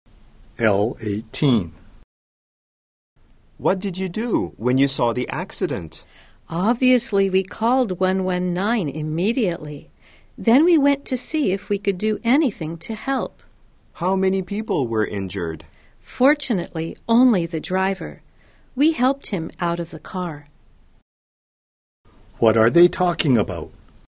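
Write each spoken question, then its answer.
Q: What are they talking about?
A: A car accident they saw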